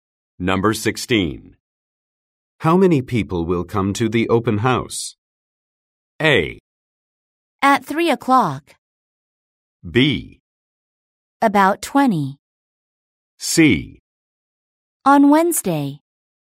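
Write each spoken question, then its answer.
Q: How many people will come to the open house?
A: B: About 20.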